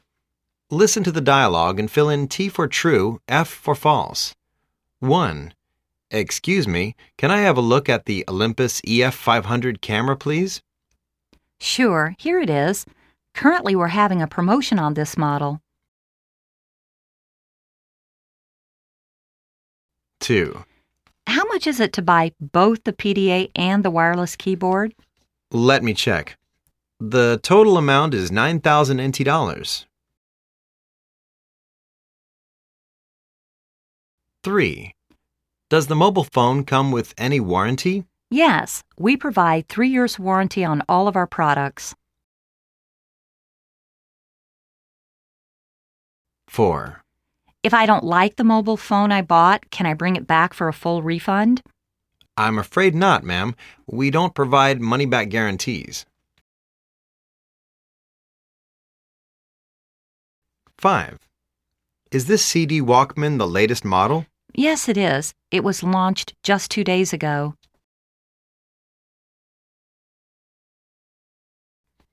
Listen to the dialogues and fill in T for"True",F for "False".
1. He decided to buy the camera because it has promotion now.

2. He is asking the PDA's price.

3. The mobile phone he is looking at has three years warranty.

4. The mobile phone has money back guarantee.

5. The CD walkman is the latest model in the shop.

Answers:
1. F
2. F
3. T
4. F
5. T